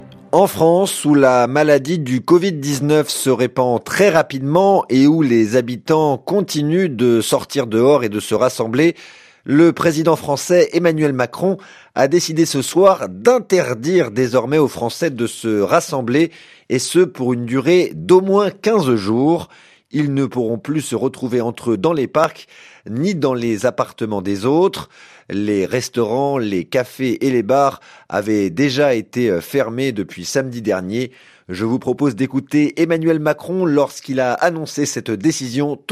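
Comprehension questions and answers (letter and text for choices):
Qu'entendez-vous ? Что вы слышите?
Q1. En France, où la maladie du Covid-19 se répand très 1____________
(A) rapidement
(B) vite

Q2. où les habitants continuent de sortir dehors et de 2____________,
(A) se réunir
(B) se rassembler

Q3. le président français Emmanuel Macron a décidé ce soir 3_______________ désormais aux Français de se rassembler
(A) d`interdire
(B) de défendre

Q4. 4_________________ jours.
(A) 15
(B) 20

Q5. Ils ne pourront plus se retrouver entre eux dans 5__________________,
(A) les jardins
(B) les parcs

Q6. ni 6__________________ dans des autres.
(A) les appartements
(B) les logements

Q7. Les restaurants, les cafés et les bars avaient déjà été 7___________________ depuis samedi dernier.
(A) interdits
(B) fermés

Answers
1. (A) rapidement
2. (B) se rassembler
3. (A) d`interdire
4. (A) 15
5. (B) les parcs
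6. (A) les appartements
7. (B) fermés

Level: А2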